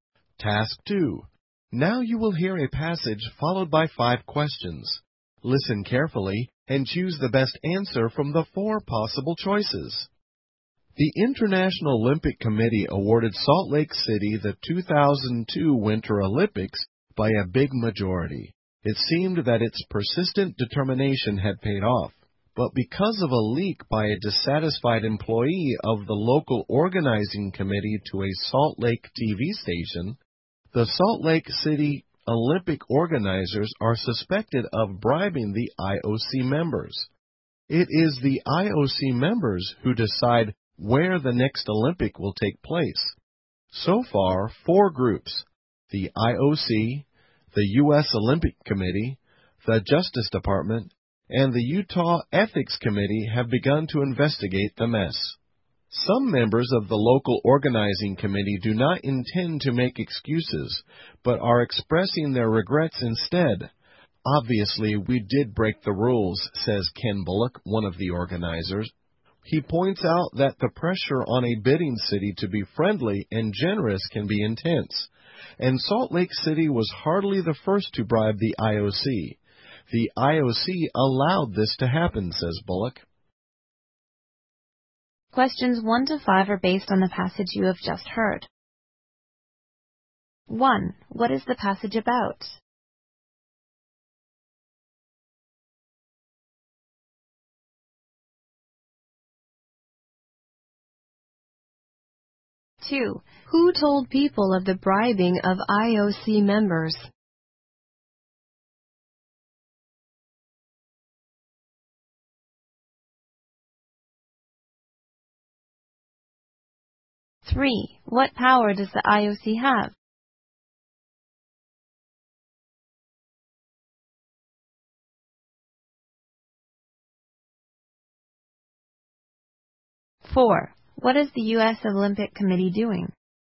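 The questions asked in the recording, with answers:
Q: Who told people of the bribing of IOC members?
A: A dissatisfied employee of the local organizing committee

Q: What power does the IOC have?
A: It decides where the next Olympics will take place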